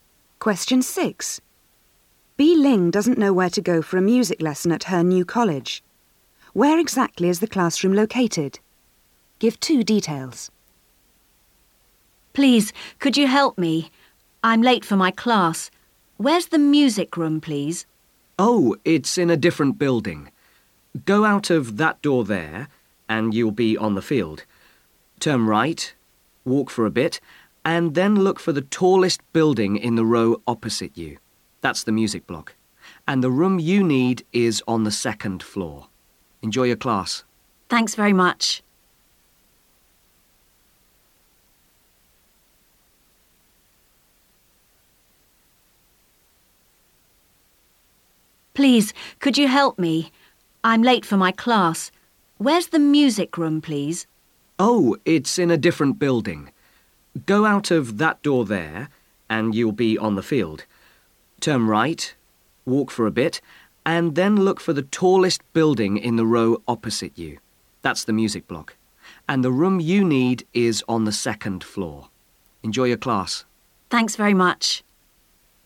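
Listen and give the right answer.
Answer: In the tallest building (the music block) opposite, on the second floor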